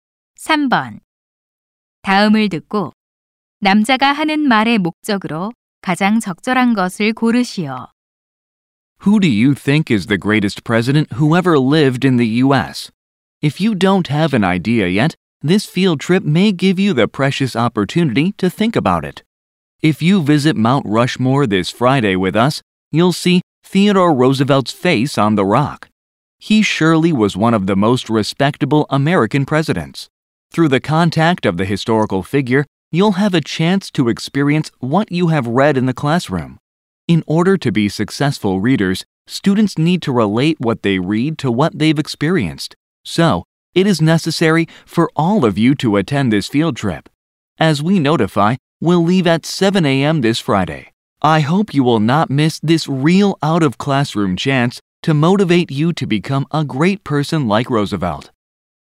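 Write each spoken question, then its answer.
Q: 다음을 듣고 남자가 하는 말의 목적으로 가장 적절한 것을 고르시오.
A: 현장 학습 참여를 독려하려고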